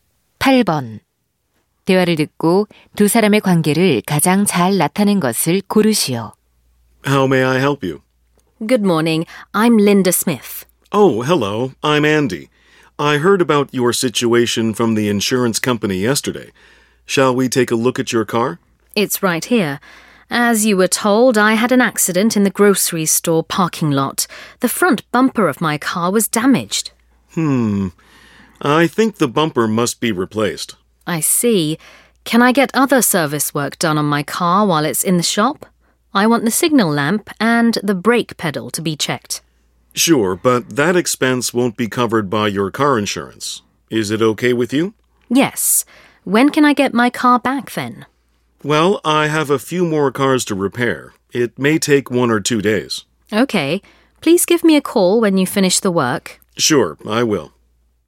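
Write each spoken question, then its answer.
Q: 대화를 듣고 두 사람의 관계를 가장 잘 나타낸 것을 고르시오.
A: 자동차 정비사 – 고객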